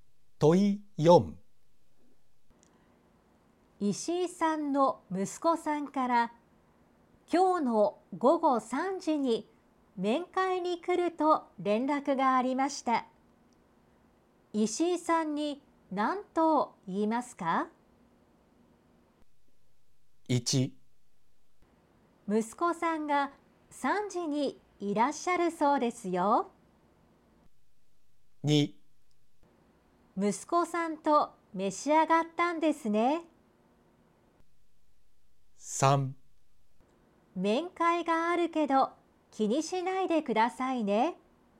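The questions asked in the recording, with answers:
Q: 石井さんに何と言いますか?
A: 1: 息子さんが3時にいらっしゃるそうですよ。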